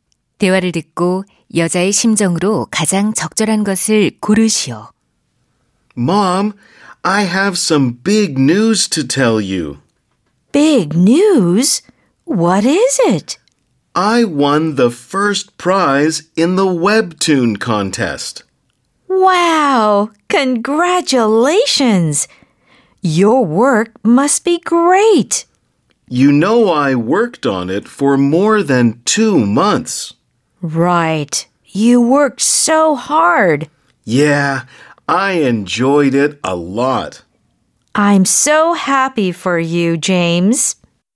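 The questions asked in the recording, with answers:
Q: 대화를 듣고 여자의 심정으로 가장 적절한 것을 고르시오.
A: 기쁨, 뿌듯함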